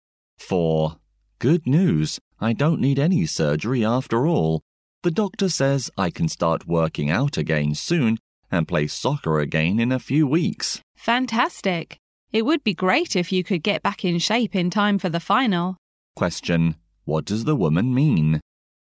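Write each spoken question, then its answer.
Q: What does the woman mean?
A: She hopes he'll be fit in time to play in the final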